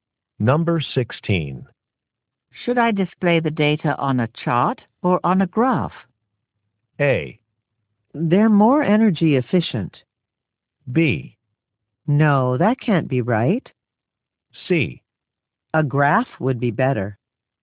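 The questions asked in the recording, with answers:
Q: Should I display the data on a chart or on a graph?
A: C: A graph would be better.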